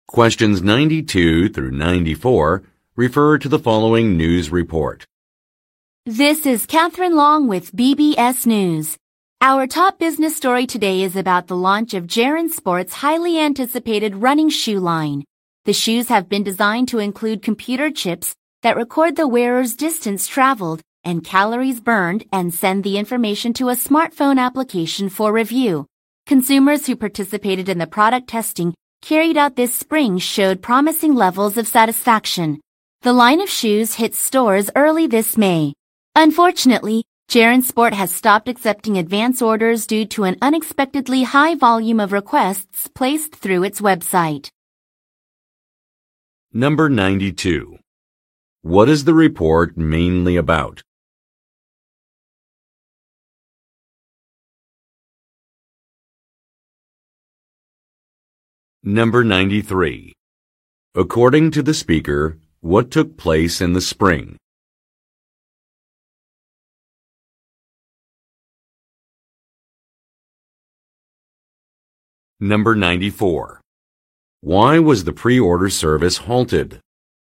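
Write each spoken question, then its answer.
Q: What is the report mainly about?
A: The launch of Jaren Sport's new running shoe line

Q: According to the speaker, what took place in the spring?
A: Product testing with consumers

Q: Why was the pre-order service halted?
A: An unexpectedly high volume of requests through its website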